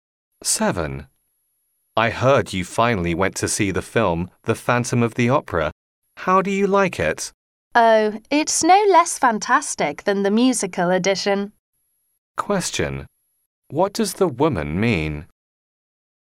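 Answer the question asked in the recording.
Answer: The film is as fantastic as the musical.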